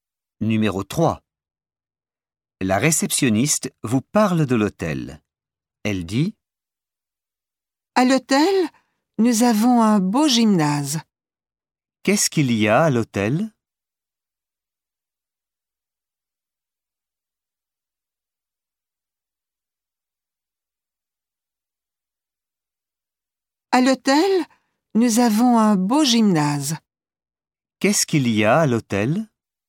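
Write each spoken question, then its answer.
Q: Qu'est-ce qu'il y a à l'hôtel?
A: un beau gymnase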